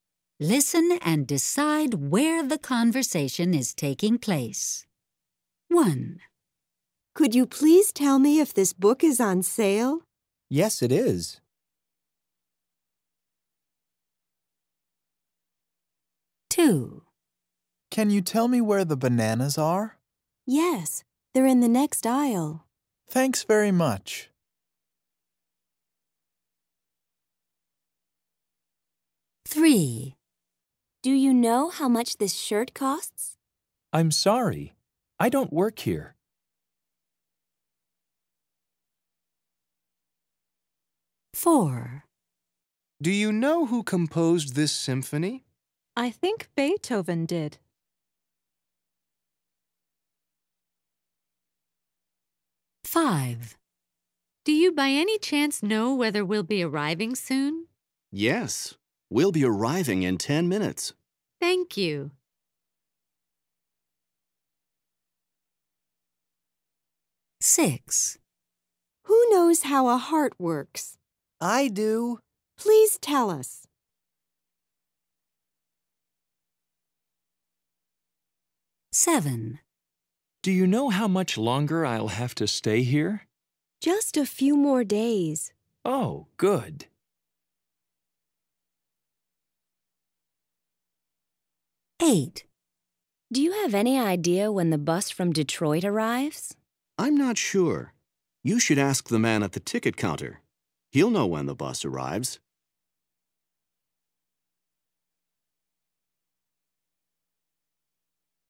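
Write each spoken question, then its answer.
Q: Listen and decide where the conversation is taking place.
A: in a bookstore

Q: Listen and decide where the conversation is taking place.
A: in a supermarket

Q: Listen and decide where the conversation is taking place.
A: in a clothing store

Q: Listen and decide where the conversation is taking place.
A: in a classroom

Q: Listen and decide where the conversation is taking place.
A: in a hospital

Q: Listen and decide where the conversation is taking place.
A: at a bus station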